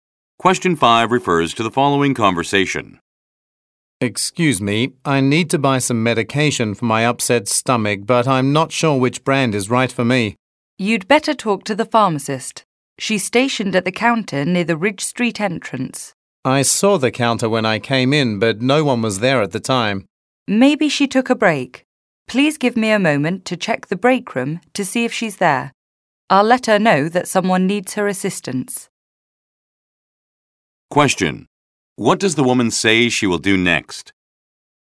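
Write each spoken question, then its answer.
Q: What does the woman say she will do next?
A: Check the break room for the pharmacist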